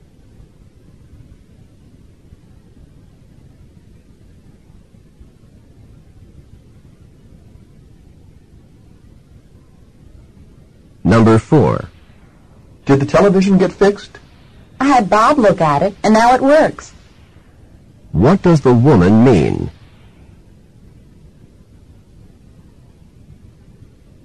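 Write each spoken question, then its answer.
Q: What does the woman mean?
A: Bob fixed the television.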